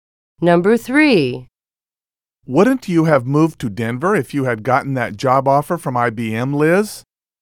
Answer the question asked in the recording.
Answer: Past is the correct answer.